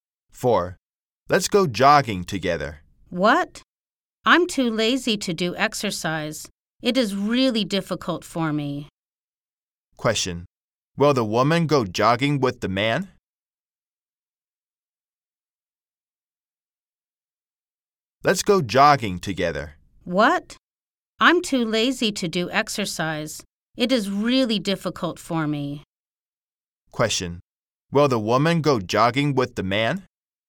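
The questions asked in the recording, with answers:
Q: Question. Will the woman go jogging with the man?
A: No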